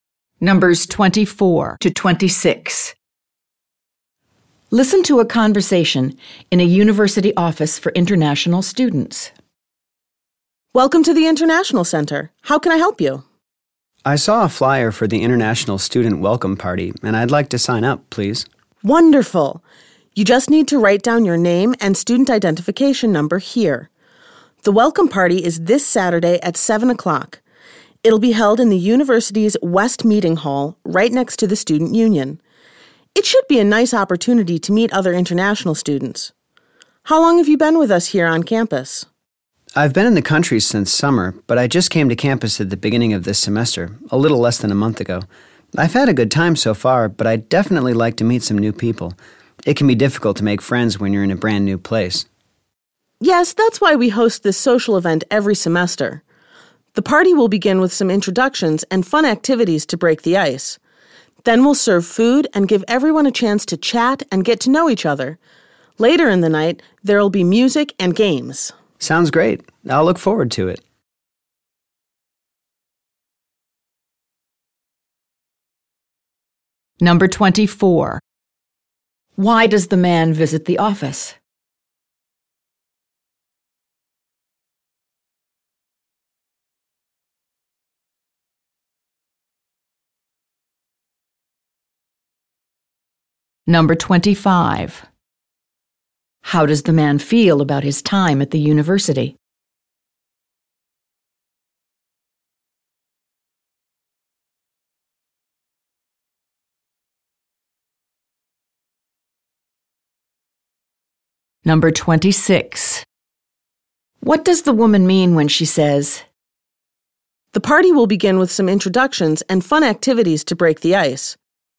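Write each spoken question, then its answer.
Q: Why does the man visit the office?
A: To sign up for the International Student Welcome Party.

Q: How does the man feel about his time at the university?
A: He has enjoyed it so far but wants to meet new people.

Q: What does the woman mean when she says,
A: The party will start with activities that help people relax and get to know each other.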